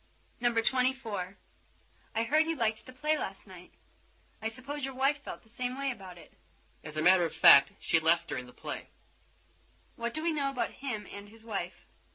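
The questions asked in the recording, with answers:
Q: What do we know about him and his wife?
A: He liked the play, but his wife didn't.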